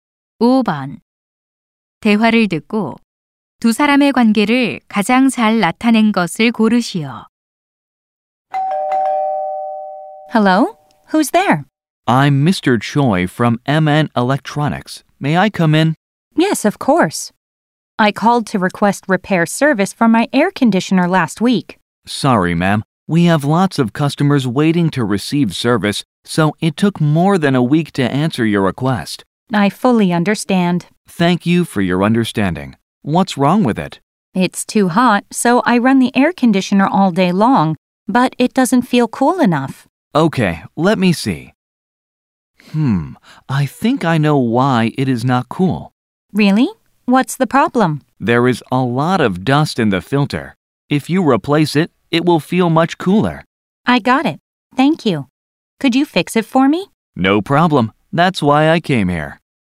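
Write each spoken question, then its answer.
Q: 대화를 듣고 두 사람의 관계를 가장 잘 나타낸 것을 고르시오.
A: 고객 - 에어컨 수리 기사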